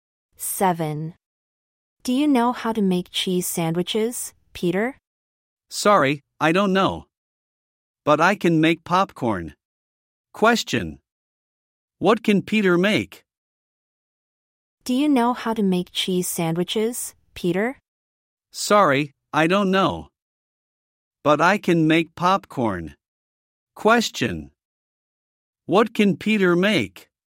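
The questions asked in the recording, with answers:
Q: What can Peter make?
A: Popcorn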